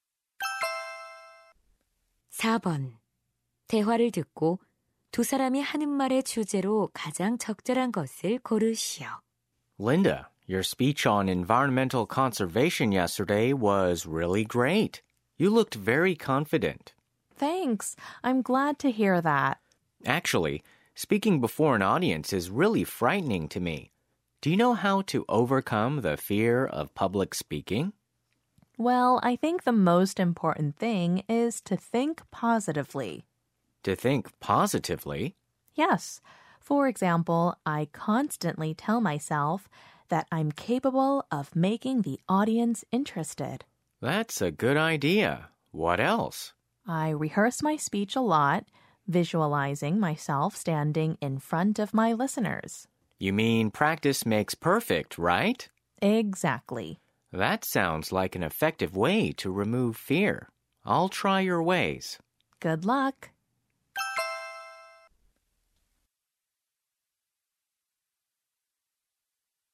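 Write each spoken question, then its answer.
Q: 대화를 듣고 두 사람이 하는 말의 주제로 가장 적절한 것을 고르시오.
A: 대중 연설에 대한 두려움을 극복하는 방법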